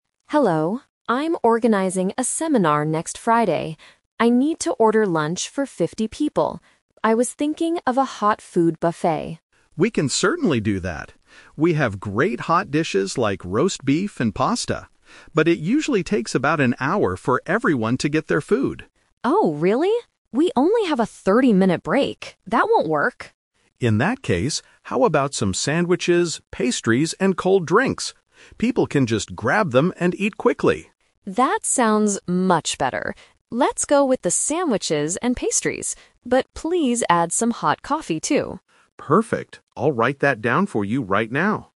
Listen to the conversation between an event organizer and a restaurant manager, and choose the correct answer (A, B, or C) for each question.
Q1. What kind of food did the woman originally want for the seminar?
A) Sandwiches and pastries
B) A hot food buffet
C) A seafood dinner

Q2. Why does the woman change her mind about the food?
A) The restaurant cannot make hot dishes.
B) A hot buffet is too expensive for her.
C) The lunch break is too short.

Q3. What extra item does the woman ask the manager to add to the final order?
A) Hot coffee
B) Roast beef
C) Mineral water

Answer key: 1B, 2C, 3A

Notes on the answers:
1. At the beginning, Emma clearly states, "I was thinking of a hot food buffet." Option (A) is the trap; sandwiches and pastries are what she chooses at the end, not what she originally wanted. Option (C) is a plausible event dinner but is never mentioned.
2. David says serving hot food takes an hour, and Emma replies, "We only have a 30-minute break. That won't work." Option (A) is a trap; David actually says, "We can certainly do that," meaning the restaurant can make it. Option (B) is a common reason to change an order, but money is not discussed.
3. After agreeing to the pastries and cold drinks, Emma says, "But please add some hot coffee, too." Option (B) is a trap; roast beef was mentioned earlier as part of the rejected hot buffet. Option (C) is a plausible drink but is not mentioned in the audio.

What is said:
Emma: Hello, I'm organizing a seminar next Friday. I need to order lunch for 50 people. I was thinking of a hot food buffet.
David: We can certainly do that. We have great hot dishes like roast beef and pasta. But it usually takes about an hour for everyone to get their food.
Emma: Oh, really? We only have a 30-minute break. That won't work.
David: In that case, how about some sandwiches, pastries, and cold drinks? People can just grab them and eat quickly.
Emma: That sounds much better. Let's go with the sandwiches and pastries. But please add some hot coffee, too.

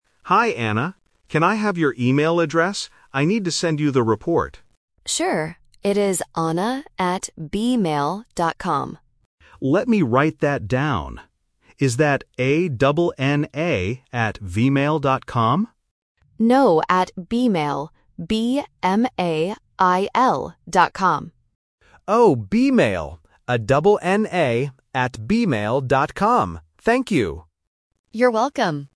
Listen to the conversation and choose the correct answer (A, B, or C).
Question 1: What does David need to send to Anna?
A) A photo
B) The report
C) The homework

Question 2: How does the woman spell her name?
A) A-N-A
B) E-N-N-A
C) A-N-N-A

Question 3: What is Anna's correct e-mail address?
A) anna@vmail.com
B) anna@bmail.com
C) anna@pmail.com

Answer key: 1B, 2C, 3B

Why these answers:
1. The correct answer is B. David explicitly says, "I need to send you the report". Option A (A photo) and Option C (The homework) are plausible things to send via email, but they are not mentioned in the audio.
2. The correct answer is C. David spells her name to confirm: "Is that A-N-N-A?", and Anna agrees with this part. Option A (A-N-A) is a common misspelling of the name. Option B (E-N-N-A) is a trap because the letters "A" and "E" are often confused by beginners in English pronunciation.
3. The correct answer is B. Anna clearly spells the domain of her email: "B-M-A-I-L dot com". Option A (anna@vmail.com) is the trap because David mishears it as "vmail" before Anna corrects him. The letters "V" and "B" sound very similar. Option C (anna@pmail.com) is just a plausible distractor.

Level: A1

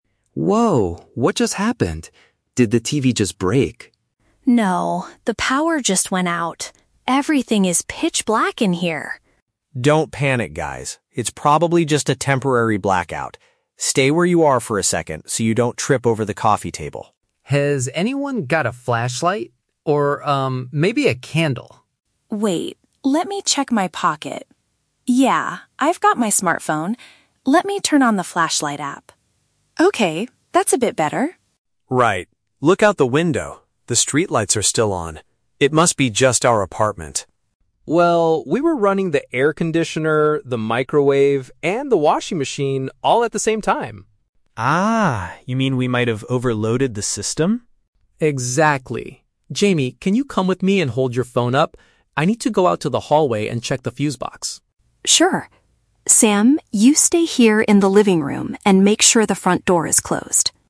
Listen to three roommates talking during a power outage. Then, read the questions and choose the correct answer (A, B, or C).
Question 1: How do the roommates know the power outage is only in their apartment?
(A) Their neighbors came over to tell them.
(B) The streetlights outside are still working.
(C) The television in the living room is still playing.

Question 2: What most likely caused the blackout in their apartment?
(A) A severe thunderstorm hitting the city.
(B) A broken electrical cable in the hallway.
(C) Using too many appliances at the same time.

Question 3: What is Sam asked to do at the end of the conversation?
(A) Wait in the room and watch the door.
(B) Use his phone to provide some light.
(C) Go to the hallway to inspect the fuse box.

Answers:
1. B
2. C
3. A

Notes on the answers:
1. Sam says, "Look out the window... the streetlights are still on." This helps them realize the problem is only in their apartment. Trap A: Incorrect. This is a plausible guess in real life, but neighbors are never mentioned in the audio. Trap C: Incorrect. The TV turned off at the very beginning when the power went out ("Did the TV just break?").
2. Alex mentions they were running "the air conditioner, the microwave, and the washing machine all at the same time." Sam then confirms they might have "overloaded the system." This is a paraphrase of using too many electrical appliances. Trap A: Incorrect. A storm is a common cause of blackouts, but it is not mentioned in the audio. Trap B: Incorrect. They mention the "hallway" because that is where the fuse box is, not because there is a broken cable there.
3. Jamie tells Sam, "you stay here in the living room and make sure the front door is closed." Trap B: Incorrect. Jamie is the one using her smartphone to provide light. Trap C: Incorrect. Alex is the one who says "I need to go out to the hallway and check the fuse box." (Students must listen carefully to distinguish who does what task).

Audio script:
Alex: "Whoa! What just happened? Did the TV just break?"
Jamie: "No, the power just went out. Everything is pitch black in here."
Sam: "Don't panic, guys. It's probably just a temporary blackout. Stay where you are for a second so you don't trip over the coffee table."
Alex: "Has anyone got a flashlight? Or, um, maybe a candle?"
Jamie: "Wait, let me check my pocket... Yeah, I've got my smartphone. Let me turn on the flashlight app. Okay, that's a bit better."
Sam: "Right. Look out the window... the streetlights are still on. It must be just our apartment."
Alex: "Well, we were running the air conditioner, the microwave, and the washing machine all at the same time."
Sam: "Ah, you mean we might have overloaded the system?"
Alex: "Exactly. Jamie, can you come with me and hold your phone up? I need to go out to the hallway and check the fuse box."
Jamie: "Sure. Sam, you stay here in the living room and make sure the front door is closed."

